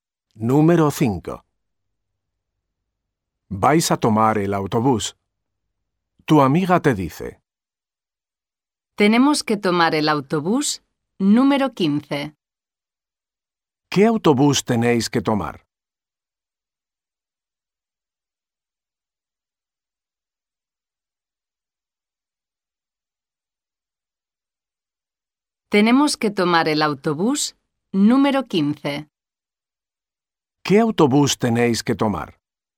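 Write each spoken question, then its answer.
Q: ¿Qué autobús tenéis que tomar?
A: El número 15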